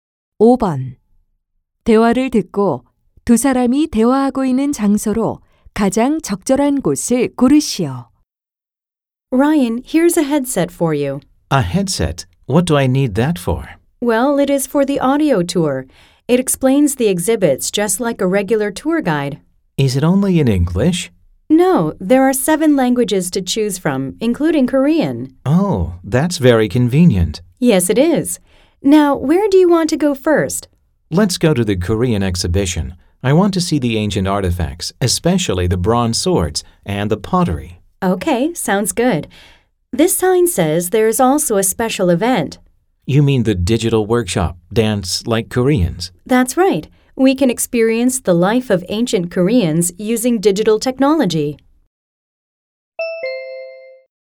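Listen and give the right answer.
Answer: 박물관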